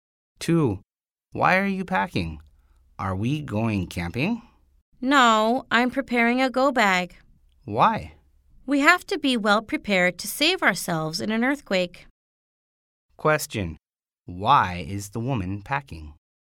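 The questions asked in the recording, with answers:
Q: Why is the woman packing?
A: She is preparing a go bag for an earthquake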